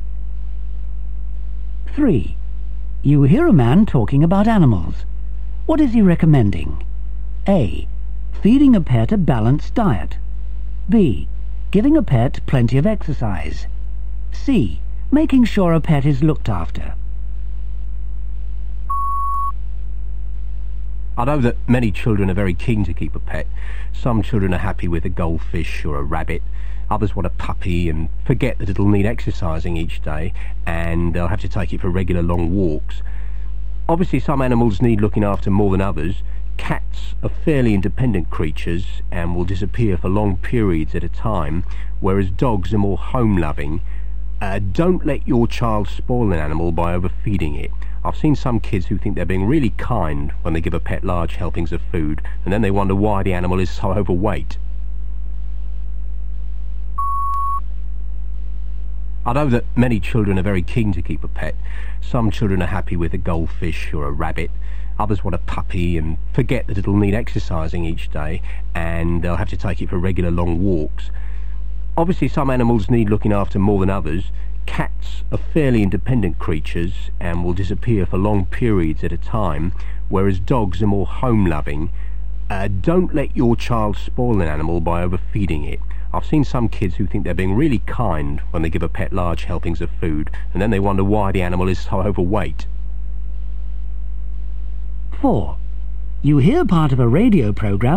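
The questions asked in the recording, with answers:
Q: What is he recommending?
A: A: Feeding a pet a balanced diet.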